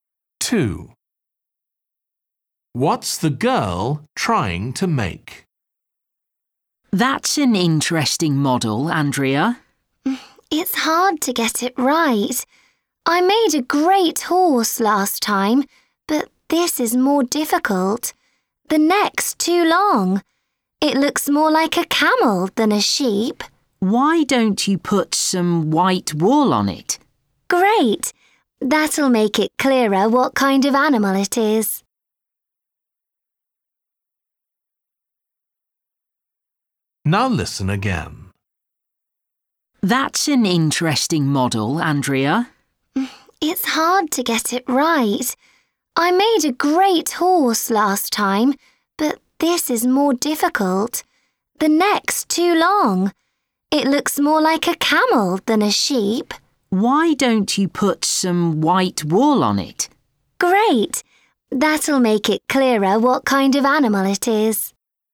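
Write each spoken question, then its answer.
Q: What's the girl trying to make?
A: a sheep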